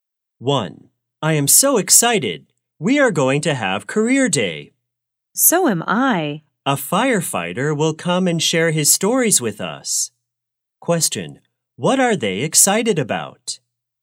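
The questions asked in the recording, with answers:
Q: What are they excited about?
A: Career day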